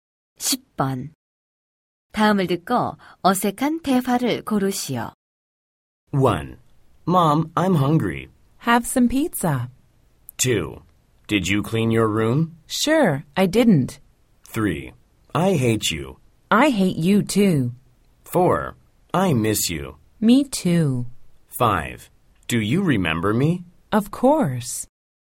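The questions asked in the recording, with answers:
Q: 다음을 듣고 어색한 대화를 고르시오.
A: 2: Did you clean your room? Sure, I didn't.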